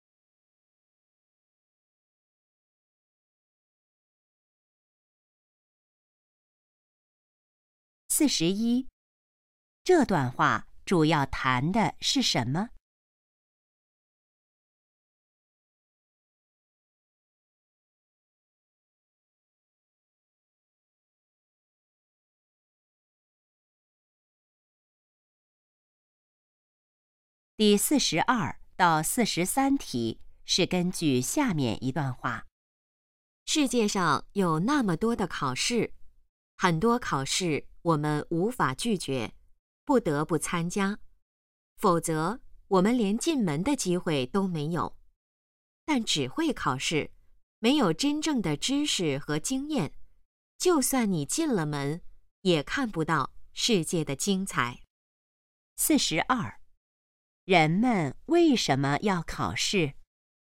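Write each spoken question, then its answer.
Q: 人们为什么要考试?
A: 否则连进门的机会都没有

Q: 要看到世界的精彩,需要什么?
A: 真正的知识和经验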